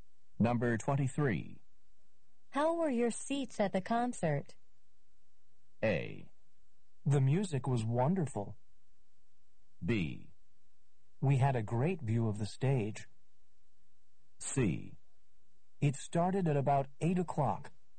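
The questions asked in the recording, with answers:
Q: How were your seats at the concert?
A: B: We had a great view of the stage.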